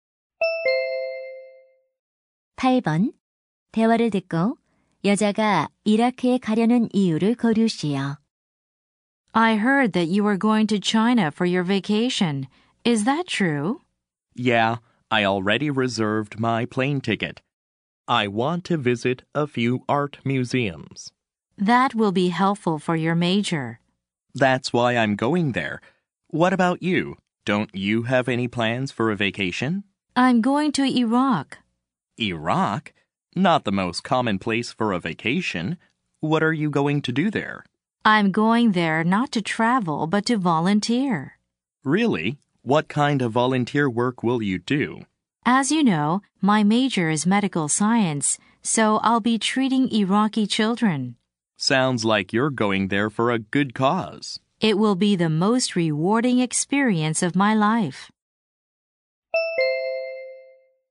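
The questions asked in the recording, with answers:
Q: 대화를 듣고 여자가 이라크에 가려는 이유를 거르시오.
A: 이라크 아이들을 치료하는 자원봉사를 하려고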